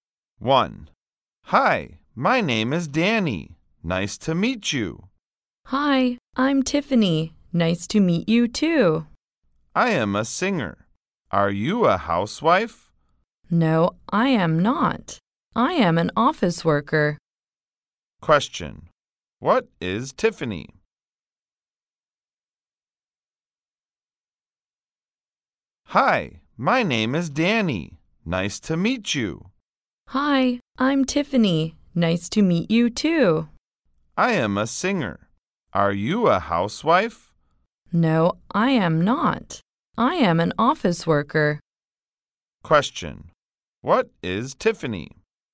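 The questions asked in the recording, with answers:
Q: What is Tiffany?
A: An office worker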